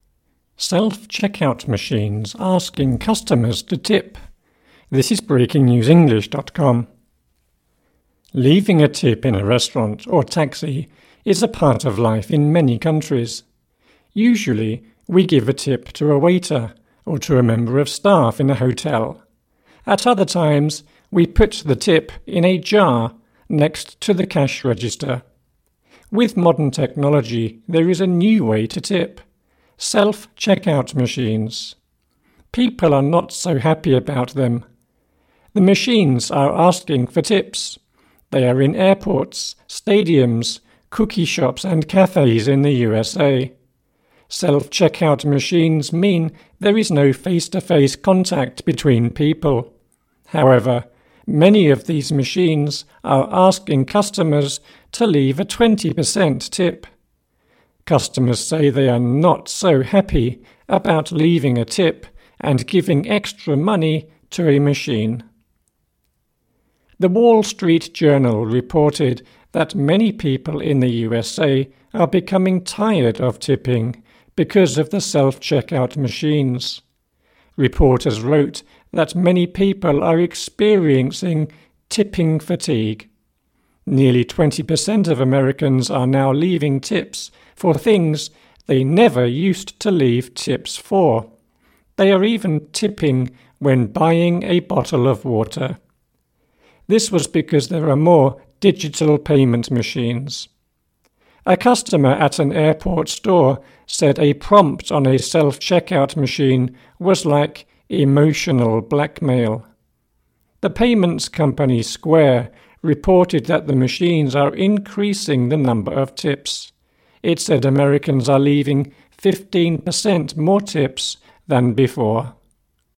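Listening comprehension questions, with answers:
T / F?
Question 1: The article says people in all countries leave tips.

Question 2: Some people leave a tip in a tip jar next to a cash register.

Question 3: People in the USA like self-checkout machines asking for tips.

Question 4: Some machines are asking customers for a 20% tip.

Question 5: People are experiencing tipping fatigue because of the machines.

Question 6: Some people are leaving tips when they buy bottles of water.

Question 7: A customer said the machines were using "emotional blackmail".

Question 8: The machines are decreasing the number of tips people leave in the US.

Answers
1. F
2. T
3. F
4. T
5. T
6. T
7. T
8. F

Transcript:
(1/28) Self-checkout machines asking customers to tip
Leaving a tip in a restaurant or taxi is a part of life in many countries. Usually, we give a tip to a waiter or to a member of staff in a hotel. 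At other times, we put the tip in a jar next to the cash register. With modern technology, there is a new way to tip – self checkout machines. People are not so happy about them. The machines are asking for tips. They are in airports, stadiums, cookie shops, and cafes in the USA. Self-checkout machines mean there is no face-to-face contact between people. However, many of these machines are asking customers to leave a 20 per cent tip. Customers say they are not so happy about leaving a tip and giving extra money to a machine.
The Wall Street Journal reported that many people in the USA are becoming tired of tipping because of the self-checkout machines. Reporters wrote that many people are experiencing "tipping fatigue". Nearly 20 per cent of Americans are now leaving tips for things they never used to leave tips for. They are even tipping when buying a bottle of water. This was because there are more digital payment machines. 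A customer at an airport store said a prompt on a self-checkout machine was like "emotional blackmail". The payments company Square reported that the machines are increasing the number of tips. It said Americans are leaving 15 per cent more tips than before.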